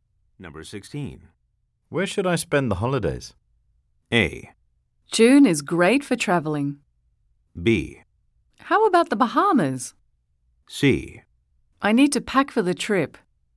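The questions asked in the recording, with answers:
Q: Where should I spend the holidays?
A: B: How about the Bahamas?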